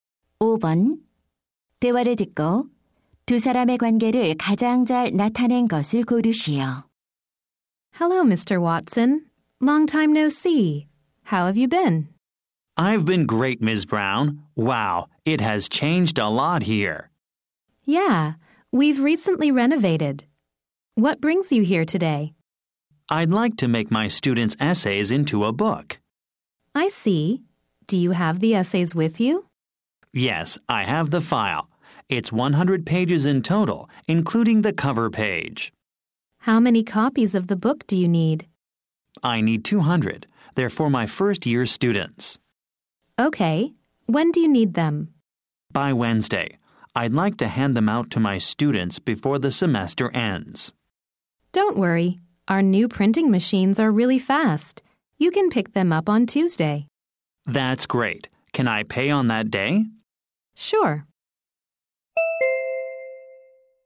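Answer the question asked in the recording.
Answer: 교사 - 인쇄소 직원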